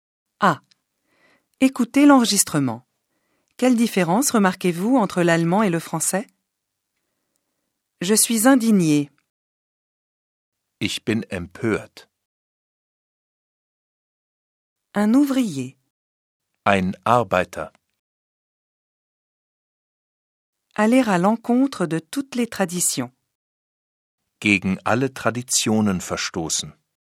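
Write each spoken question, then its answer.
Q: Quelle différence remarquez-vous entre l'allemand et le français?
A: En allemand, il n'y a pas de liaison : chaque mot qui commence par une voyelle est prononcé séparément, avec une attaque dure.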